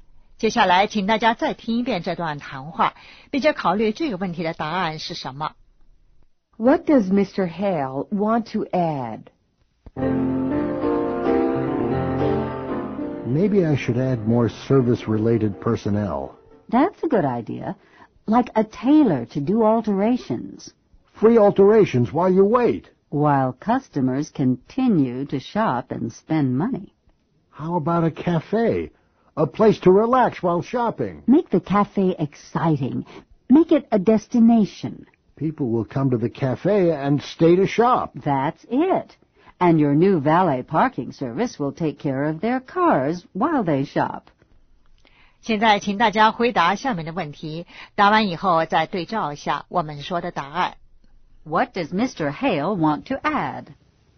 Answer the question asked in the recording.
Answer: More service-related personnel.